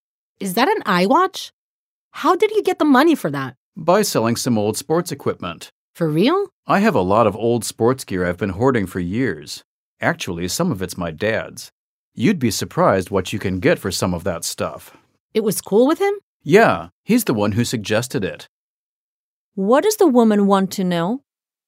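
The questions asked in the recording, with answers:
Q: What does the woman want to know?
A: How the man got the money to buy his iWatch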